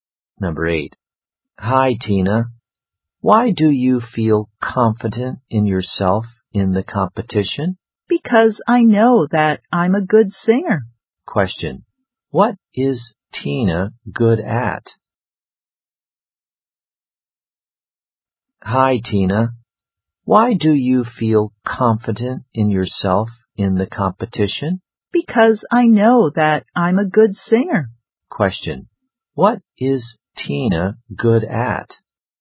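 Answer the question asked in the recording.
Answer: Singing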